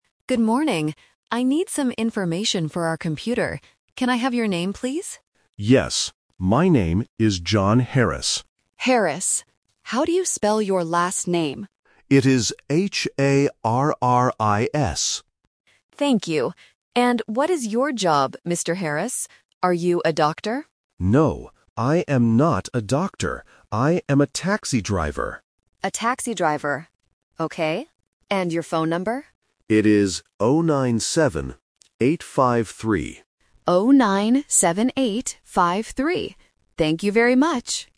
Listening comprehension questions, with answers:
Listen to the conversation between a receptionist and a customer. Choose the correct answer (A, B, or C) for each question.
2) What is the man's job?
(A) A doctor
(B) A taxi driver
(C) A bus driver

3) What is the man's phone number?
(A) 097 853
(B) 097 835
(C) 098 753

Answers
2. B
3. A

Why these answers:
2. The man says clearly "I am a taxi driver." Option (A) is a trap because the receptionist asks "Are you a doctor?", but the man says "No". Option (C) is a similar job but is not mentioned in the audio.
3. The customer says his number is "0-9-7, 8-5-3" and the receptionist repeats it. Options (B) and (C) have mixed-up numbers to test the listener's focus on detail.

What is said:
Receptionist: Good morning. I need some information for our computer. Can I have your name, please?
Customer: Yes. My name is John Harris.
Receptionist: Harris. How do you spell your last name?
Receptionist: Thank you. And what is your job, Mr. Harris? Are you a doctor?
Customer: No, I am not a doctor. I am a taxi driver.
Receptionist: A taxi driver. Okay. And your phone number?

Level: A1

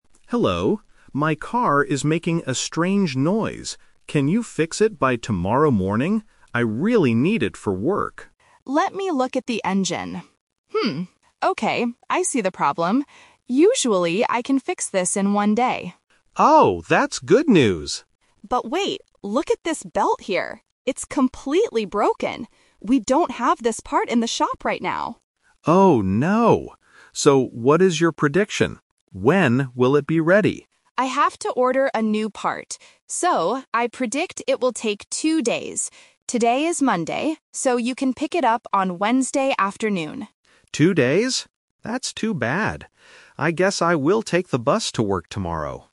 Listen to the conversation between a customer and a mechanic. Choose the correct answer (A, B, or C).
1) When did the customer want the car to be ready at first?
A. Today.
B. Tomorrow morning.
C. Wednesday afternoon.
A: B

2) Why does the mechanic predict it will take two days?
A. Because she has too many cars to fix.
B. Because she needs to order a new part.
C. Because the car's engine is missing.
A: B

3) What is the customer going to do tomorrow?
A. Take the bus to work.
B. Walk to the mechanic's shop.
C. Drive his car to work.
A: A

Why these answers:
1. The customer asks at the beginning: "Can you fix it by tomorrow morning?"
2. The mechanic says the belt is broken and "We don't have this part in the shop right now" and then adds "I have to order a new part."
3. At the end, the customer says: "I guess I will take the bus to work tomorrow."

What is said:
My car is making a strange noise. Can you fix it by tomorrow morning? I really need it for work.
Mechanic: Let me look at the engine. okay, I see the problem. Usually, I can fix this in one day.
Customer: Oh, that's good news!
Mechanic: But wait... look at this belt here. It's completely broken! We don't have this part in the shop right now.
Customer: Oh no. So, what is your prediction? When will it be ready?
Mechanic: I have to order a new part. So, I predict it will take two days. Today is Monday, so you can pick it up on Wednesday afternoon.
That's too bad. I guess I will take the bus to work tomorrow.

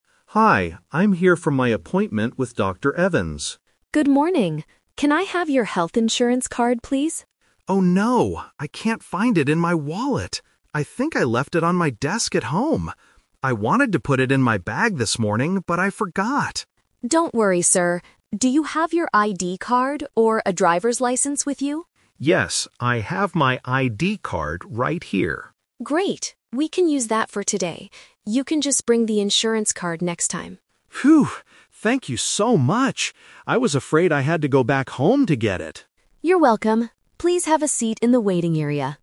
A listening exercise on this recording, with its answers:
Listen to the conversation between a patient and a receptionist. Choose the correct answer (A, B, or C) for each question.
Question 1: Where is the patient's health insurance card?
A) In his wallet.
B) On his desk at home.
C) In his bag.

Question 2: Which card does the patient give to the receptionist?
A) His ID card.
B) His driver's license.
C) His health insurance card.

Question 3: What did the patient think he had to do?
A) Call someone to bring the card.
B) Pay extra money for the doctor.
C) Go back home to get the card.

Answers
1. B
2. A
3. C

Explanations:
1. The patient explicitly says, "I think I left it on my desk at home." Trap A is wrong: The patient looked in his wallet, but he says "I can't find it in my wallet." Trap C is wrong (The Twist): He says "I wanted to put it in my bag... but I forgot." It is not in the bag.
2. The patient says, "Yes, I have my ID card right here," and the receptionist accepts it. Trap B is wrong: The receptionist asks if he has an ID card or a driver's license, but he only has the ID card. Trap C is wrong: The health insurance card is the one he left at home.
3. At the end of the conversation, the patient says, "I was afraid I had to go back home to get it." Trap A is wrong: Calling someone is a logical solution, but he doesn't mention doing it. Trap B is wrong: Paying extra money is not mentioned in the audio.

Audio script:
Patient: Hi, I'm here for my appointment with Dr. Evans.
Receptionist: Good morning. Can I have your health insurance card, please?
Patient: Oh no! I can't find it in my wallet. I think I left it on my desk at home. I wanted to put it in my bag this morning, but I forgot.
Receptionist: Don't worry, sir. Do you have your ID card or a driver's license with you?
Patient: Yes, I have my ID card right here.
Receptionist: Great. We can use that for today. You can just bring the insurance card next time.
Patient: Phew! Thank you so much. I was afraid I had to go back home to get it.

